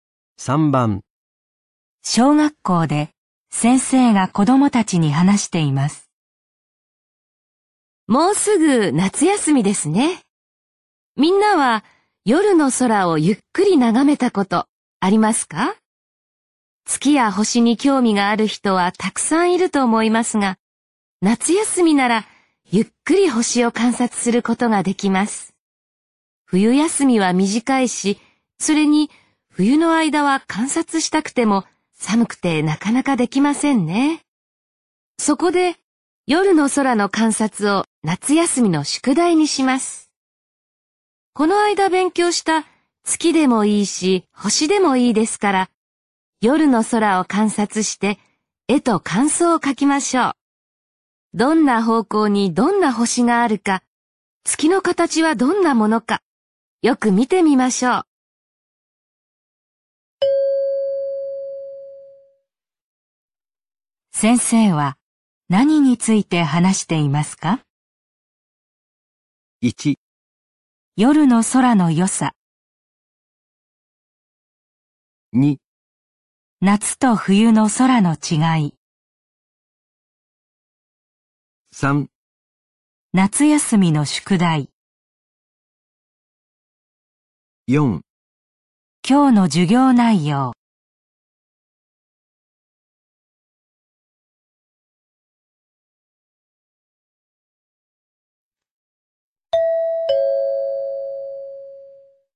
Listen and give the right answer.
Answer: 3

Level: N3 Listening · Test 12